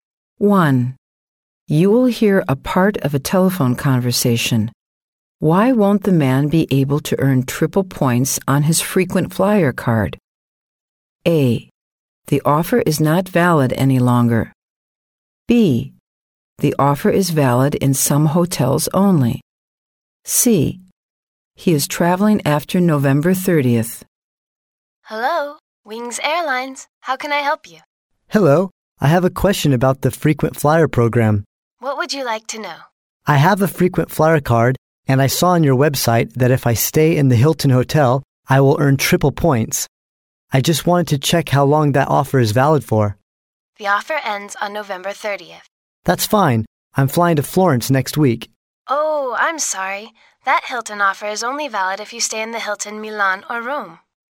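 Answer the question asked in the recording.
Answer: B: The offer is valid in some hotels only.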